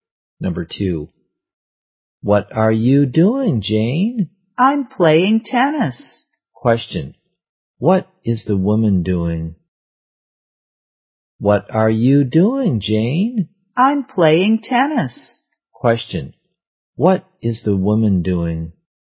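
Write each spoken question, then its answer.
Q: Question, what is the woman doing?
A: Playing tennis.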